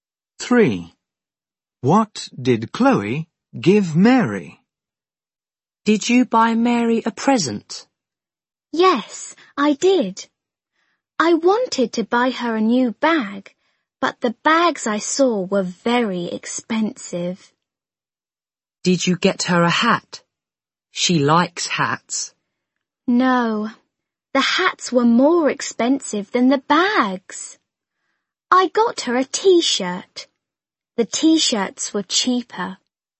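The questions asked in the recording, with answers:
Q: What did Chloe give Mary?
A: A t-shirt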